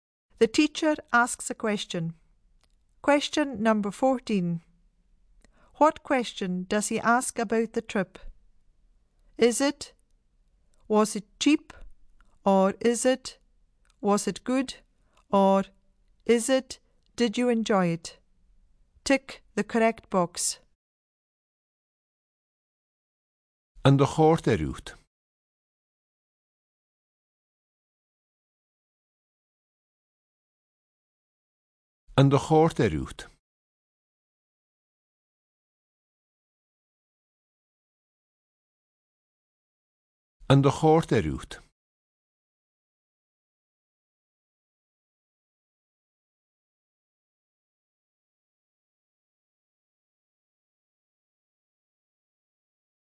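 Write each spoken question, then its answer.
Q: What question does he ask about the trip?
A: Did you enjoy it?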